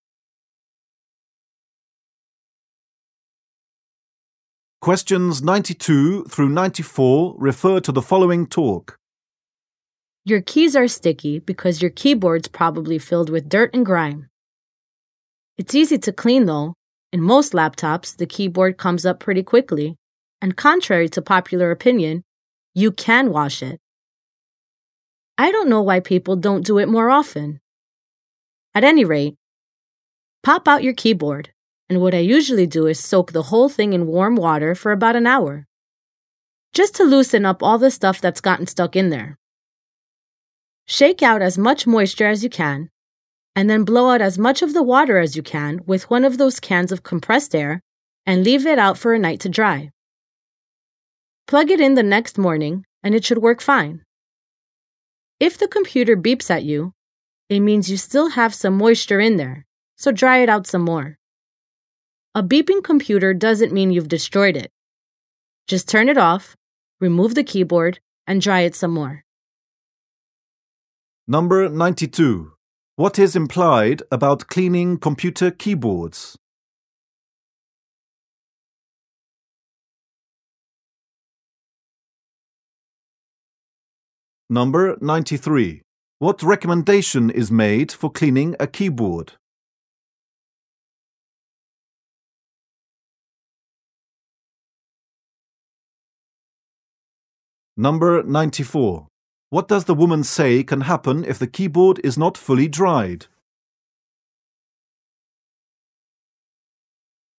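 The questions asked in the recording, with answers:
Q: What recommendation is made for cleaning a keyboard?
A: Soak it in warm water for about an hour

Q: What does the woman say can happen if the keyboard is not fully dried?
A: The computer will beep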